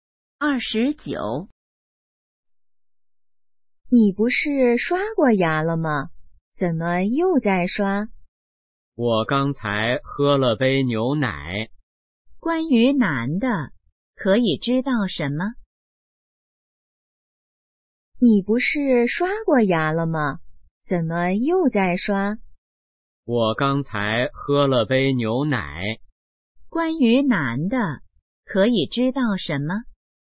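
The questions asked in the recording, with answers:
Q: 关于男的,可以知道什么?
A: 刚喝了牛奶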